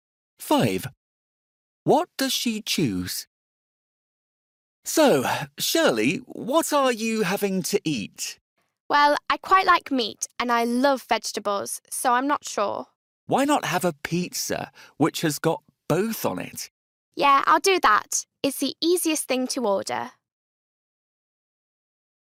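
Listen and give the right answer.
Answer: A pizza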